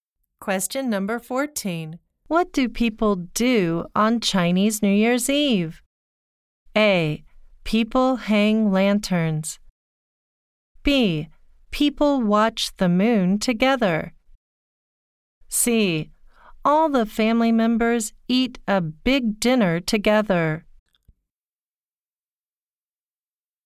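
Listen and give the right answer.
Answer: C: All the family members eat a big dinner together.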